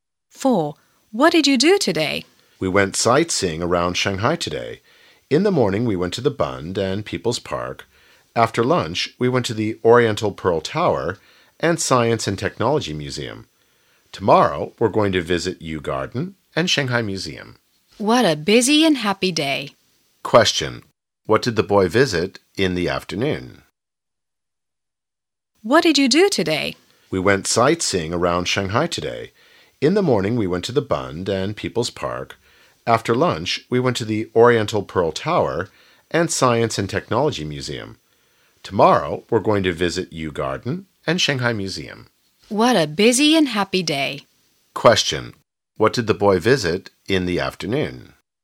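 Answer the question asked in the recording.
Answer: The Oriental Pearl Tower and the Science and Technology Museum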